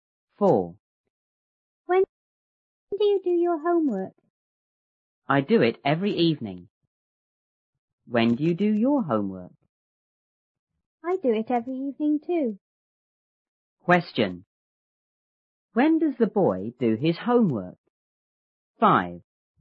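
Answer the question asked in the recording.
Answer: Every evening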